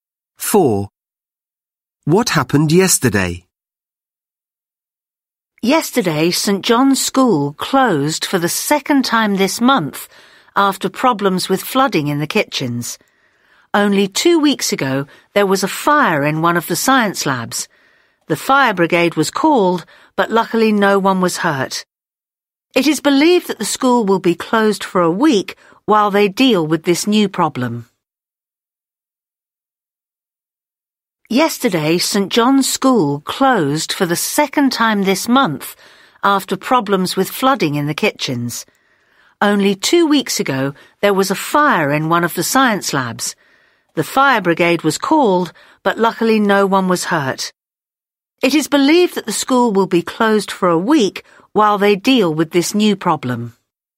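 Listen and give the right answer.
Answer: The school closed because of flooding in the kitchens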